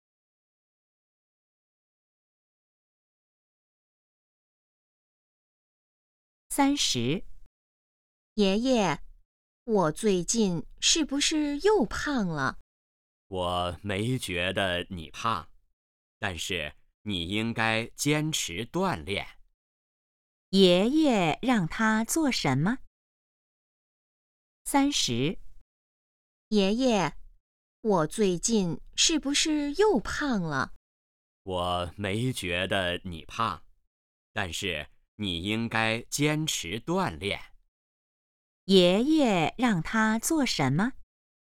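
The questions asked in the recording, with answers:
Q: 爷爷让他做什么?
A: 坚持锻炼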